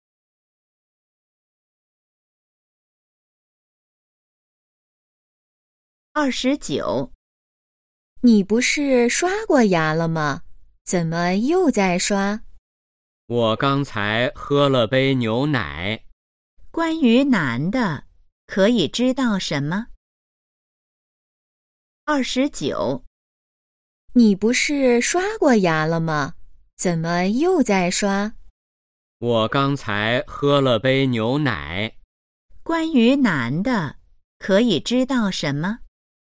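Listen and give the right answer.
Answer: 刚喝了牛奶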